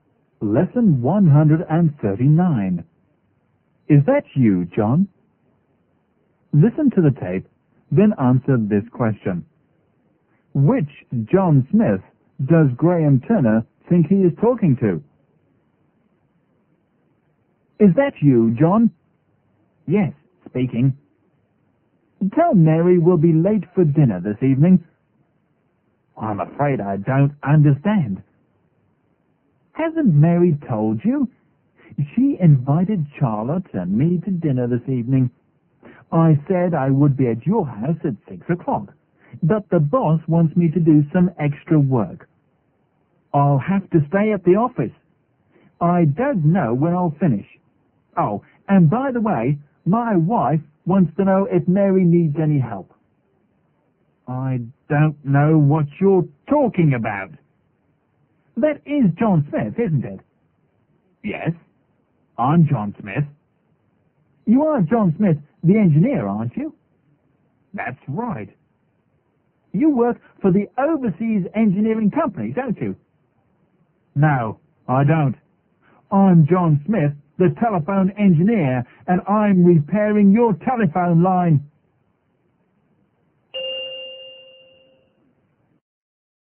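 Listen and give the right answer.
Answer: John Smith the engineer who works for the Overseas Engineering Company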